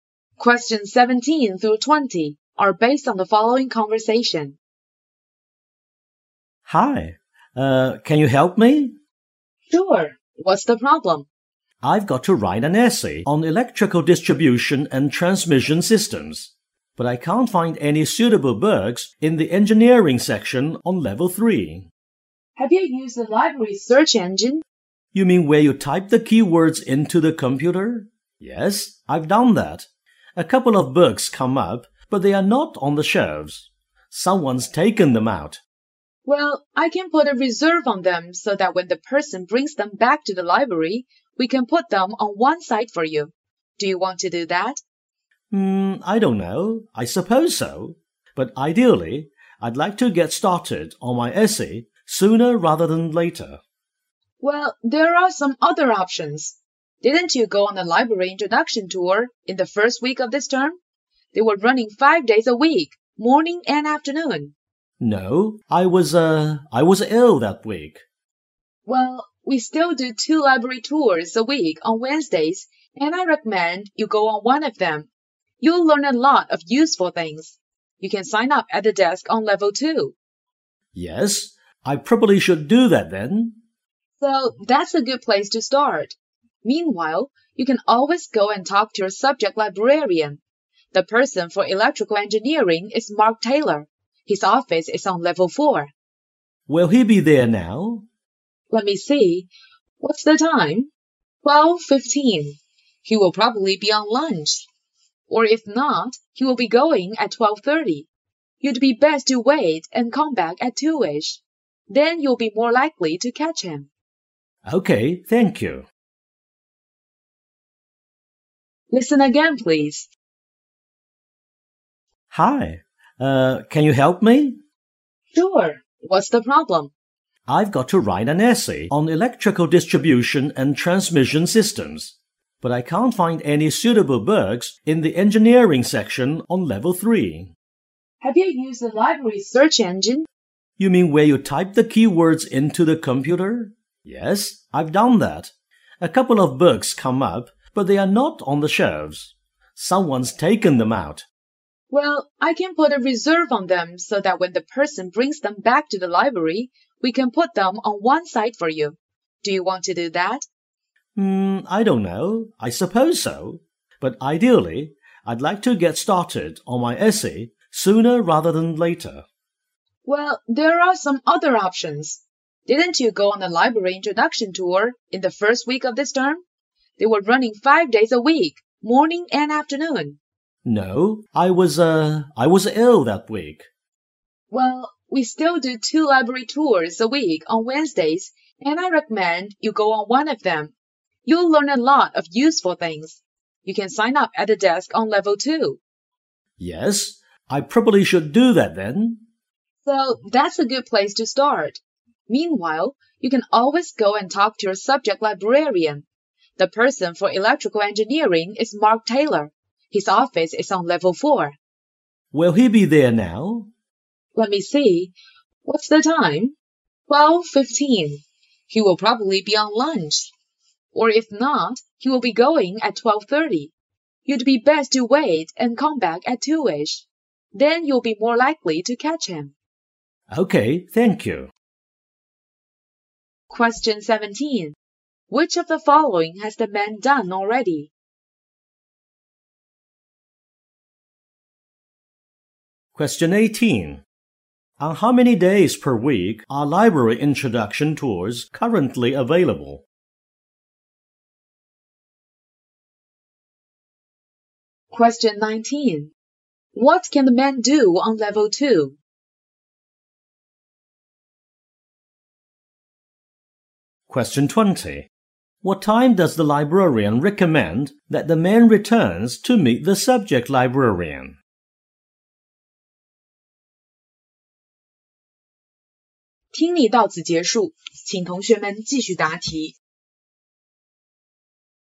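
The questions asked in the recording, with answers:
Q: Which of the following has the man done already?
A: Used the library search engine

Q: On how many days per week are library introduction tours currently available?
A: One (Wednesdays)

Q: What can the man do on level 2?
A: Sign up for a library tour

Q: What time does the librarian recommend that the man returns to meet the subject librarian?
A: About 2 o'clock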